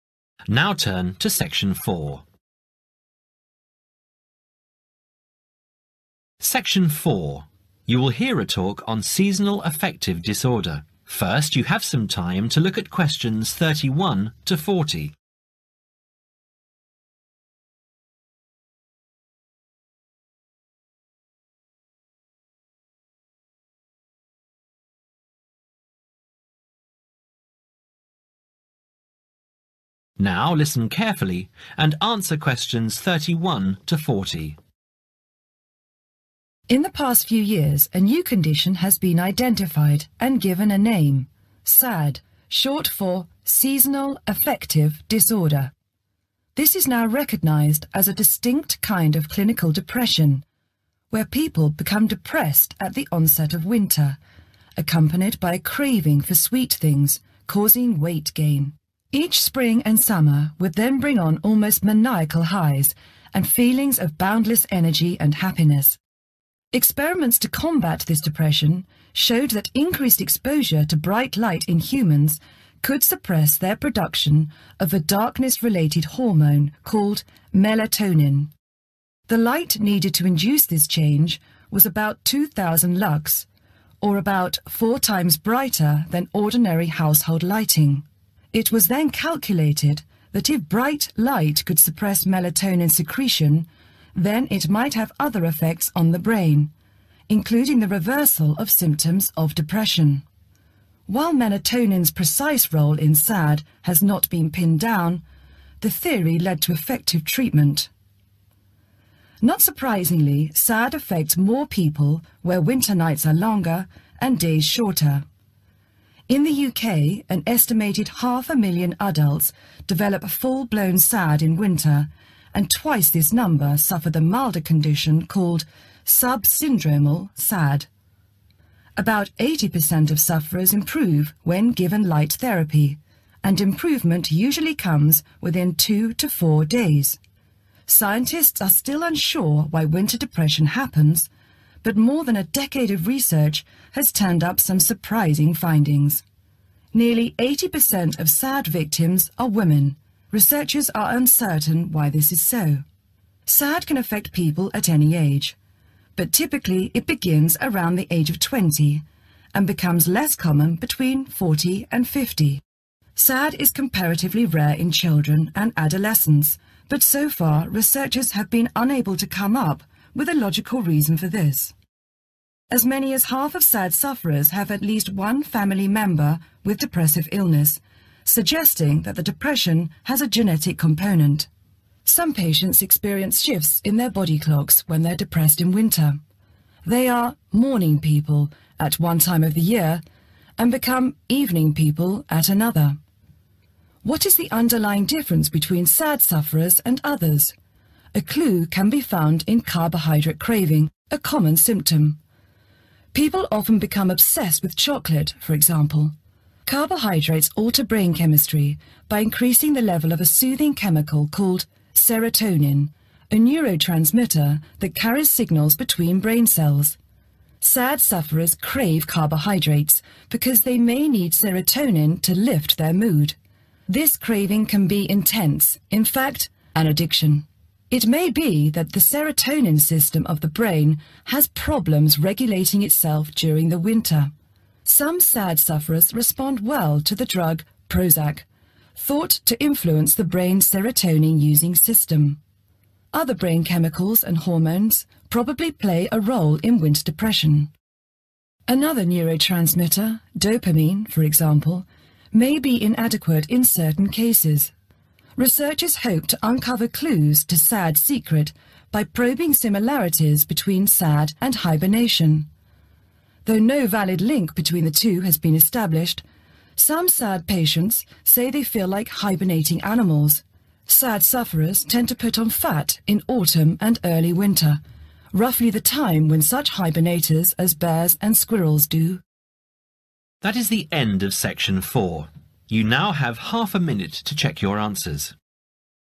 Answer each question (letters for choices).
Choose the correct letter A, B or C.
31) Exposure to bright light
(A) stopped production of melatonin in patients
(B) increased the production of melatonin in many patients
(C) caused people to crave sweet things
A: A

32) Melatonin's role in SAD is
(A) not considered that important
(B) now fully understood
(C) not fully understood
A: C

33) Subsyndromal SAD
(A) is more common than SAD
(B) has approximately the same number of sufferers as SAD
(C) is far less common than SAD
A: A

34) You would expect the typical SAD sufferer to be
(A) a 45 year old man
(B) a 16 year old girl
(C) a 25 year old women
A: C

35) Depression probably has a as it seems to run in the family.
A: genetic component

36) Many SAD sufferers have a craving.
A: carbohydrate

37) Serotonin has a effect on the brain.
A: soothing

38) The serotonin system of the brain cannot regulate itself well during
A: winter

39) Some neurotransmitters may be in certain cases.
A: inadequate